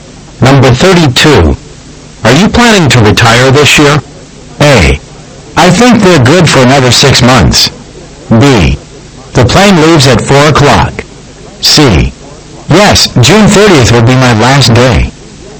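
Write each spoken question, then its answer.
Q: Are you planning to retire this year?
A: C: Yes, June 30th will be my last day.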